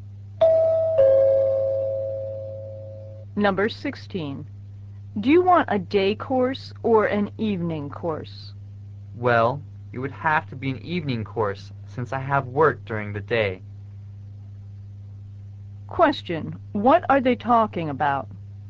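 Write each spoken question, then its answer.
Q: What are they talking about?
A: Choosing a course (an evening course)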